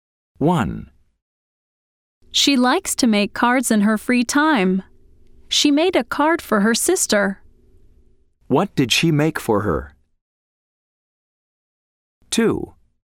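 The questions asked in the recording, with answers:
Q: What did she make for her?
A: a card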